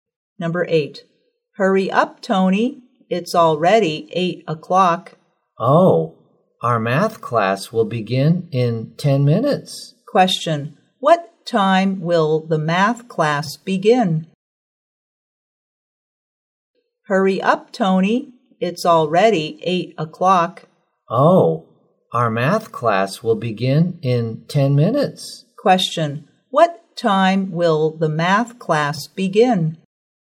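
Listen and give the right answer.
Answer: At 8:10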